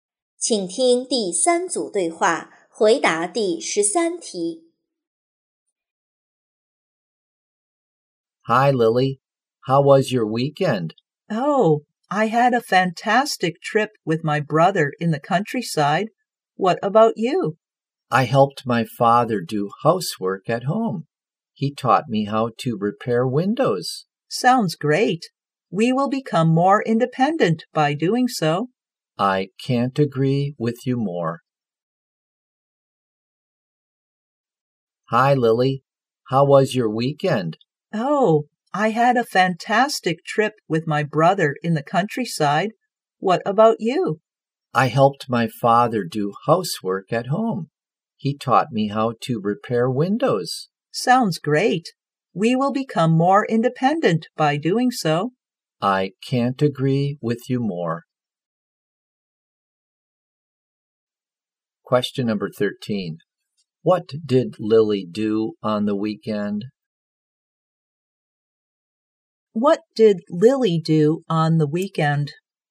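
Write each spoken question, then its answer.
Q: What did Lily do on the weekend?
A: She had a trip with her brother in the countryside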